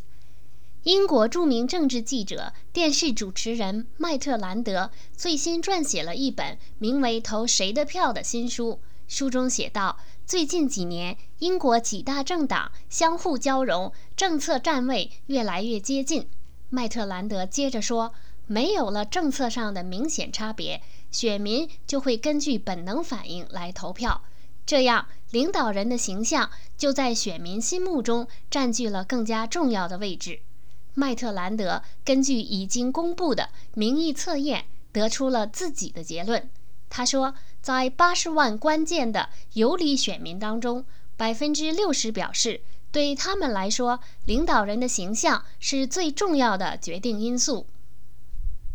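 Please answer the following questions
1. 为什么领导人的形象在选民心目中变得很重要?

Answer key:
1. 因为几大政党政策越来越接近,没有明显差别,选民就根据本能反应投票

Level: 3rd Year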